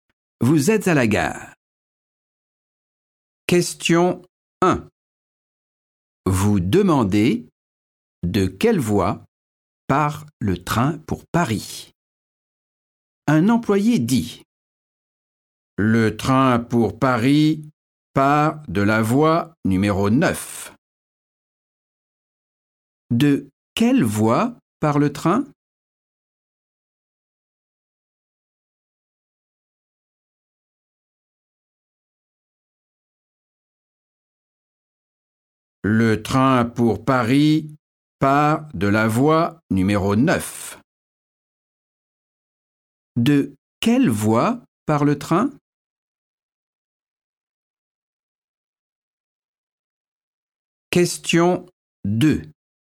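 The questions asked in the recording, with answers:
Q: De quelle voie part le train?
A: voie numéro 9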